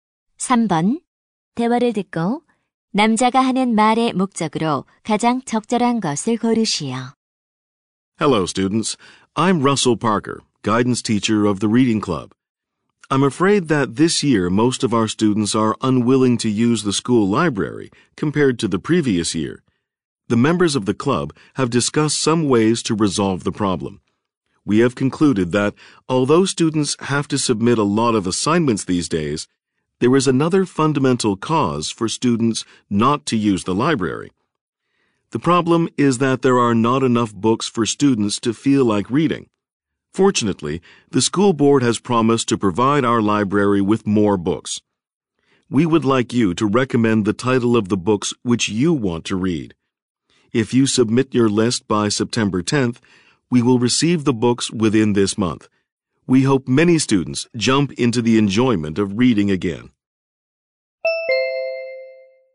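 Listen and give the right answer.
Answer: 학교 도서관에 들일 읽고 싶은 책 제목 추천을 요청하려고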